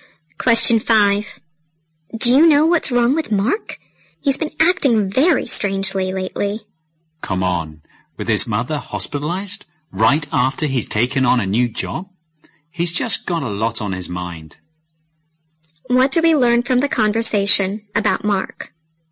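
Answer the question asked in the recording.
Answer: He is under a lot of pressure because his mother is in hospital and he has just started a new job.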